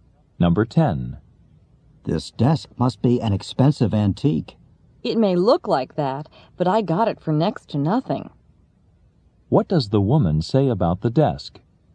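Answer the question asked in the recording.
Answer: It was very cheap.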